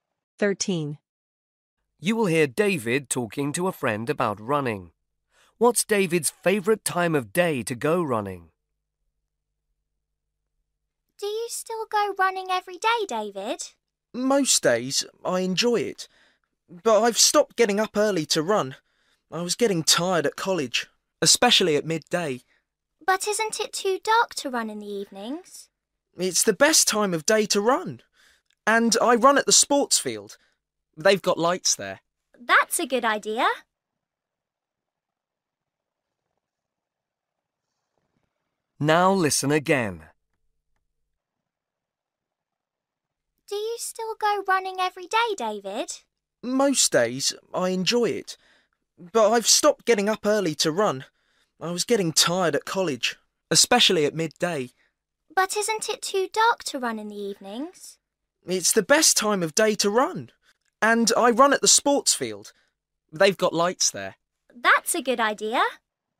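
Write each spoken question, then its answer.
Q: What's David's favourite time of day to go running?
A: evening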